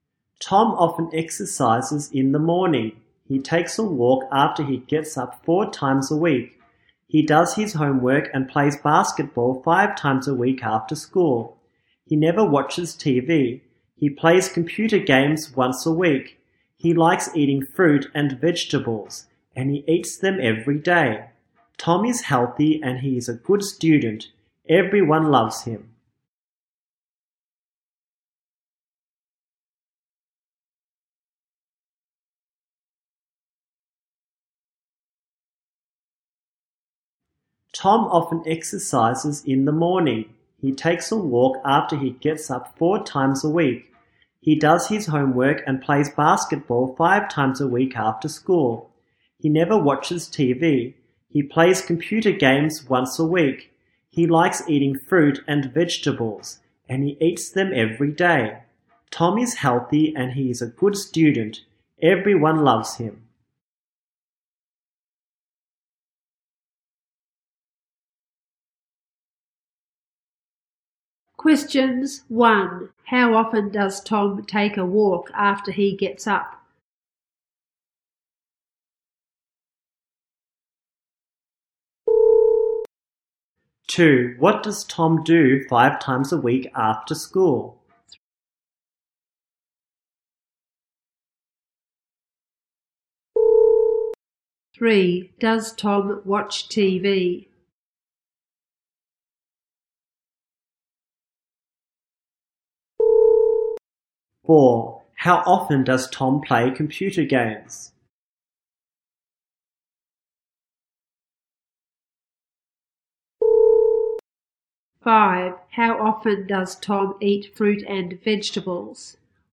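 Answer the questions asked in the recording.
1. 4 times a week
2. He does his homework and plays basketball.
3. No, he never watches TV.
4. Once a week
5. Every day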